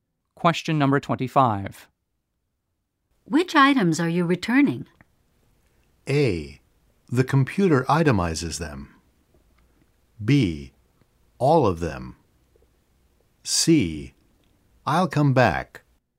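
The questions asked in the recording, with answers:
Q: Which items are you returning?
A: B: All of them.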